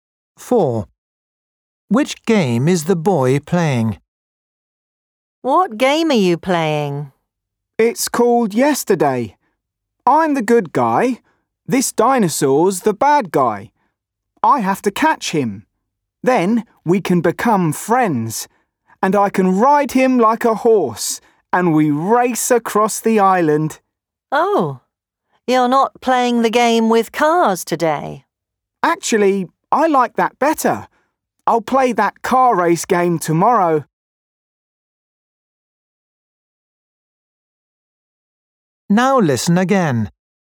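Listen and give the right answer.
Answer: a dinosaur game called Yesterday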